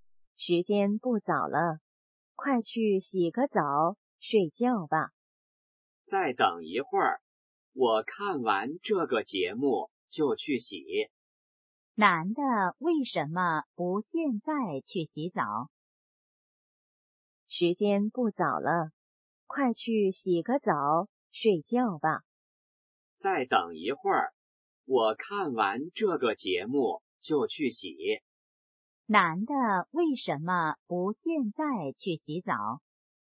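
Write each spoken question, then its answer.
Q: 男的为什么不现在去洗澡?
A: 想看完节目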